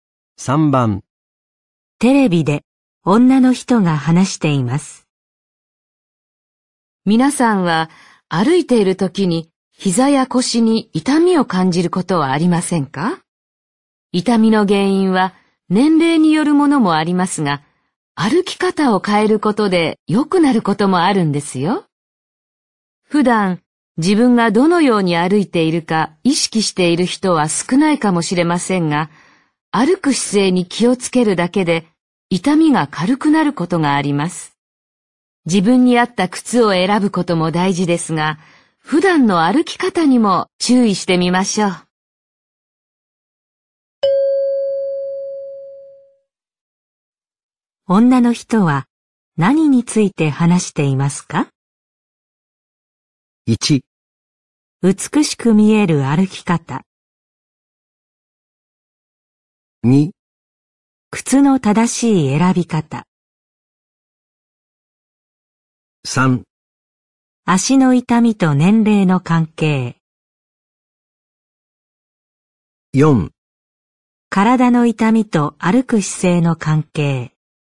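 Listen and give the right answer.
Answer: 4: 体の痛みと歩く姿勢の関係。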